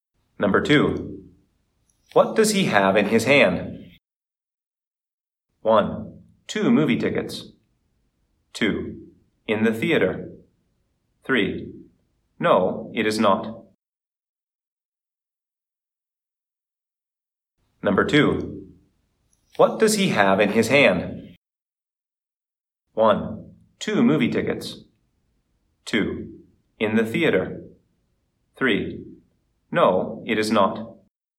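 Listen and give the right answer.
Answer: 1: Two movie tickets.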